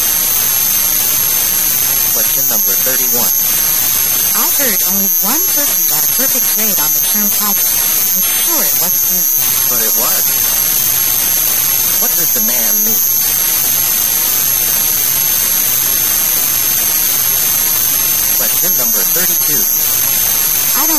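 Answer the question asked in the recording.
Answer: He got the perfect grade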